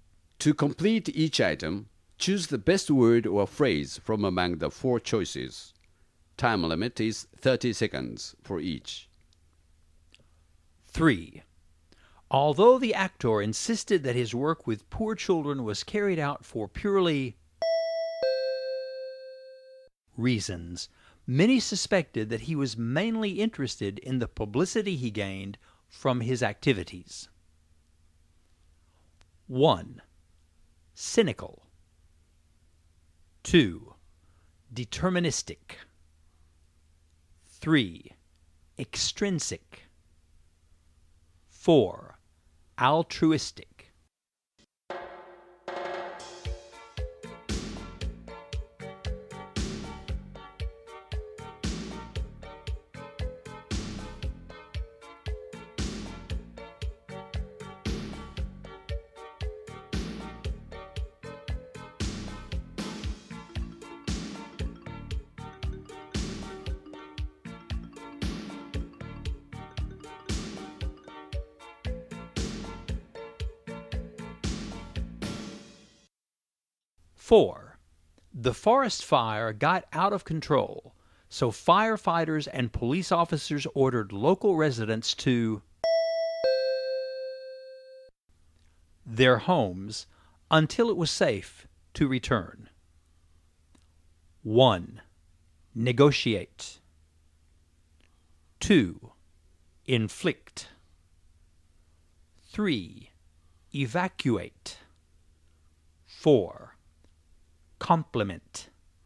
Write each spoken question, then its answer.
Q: Although the actor insisted that his work with poor children was carried out for purely reasons, many suspected that he was mainly interested in the publicity he gained from his activities.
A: As for 3, you should choose 4, altruistic.

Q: the forest fire got out of control, so firefighters and police officers ordered local residents to their homes until it was safe to return.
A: As for 4, the best word is 3, evacuate.